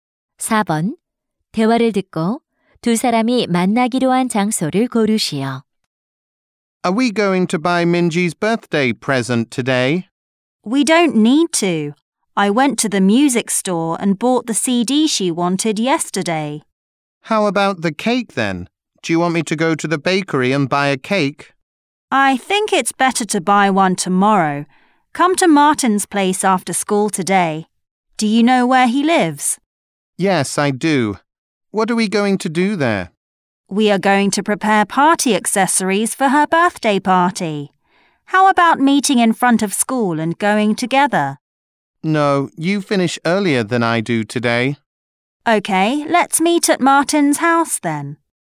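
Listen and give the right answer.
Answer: 마틴의 집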